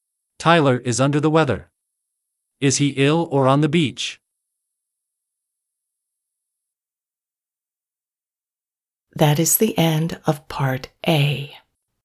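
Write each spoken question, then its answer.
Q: Is he ill or on the beach?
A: Ill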